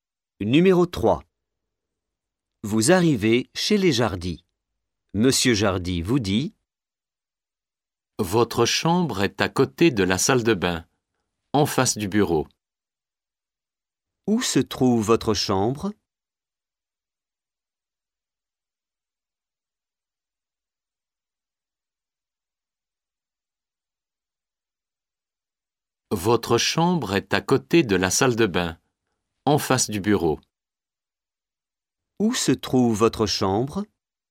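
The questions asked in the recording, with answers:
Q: Où se trouve votre chambre ?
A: À côté de la salle de bain, en face du bureau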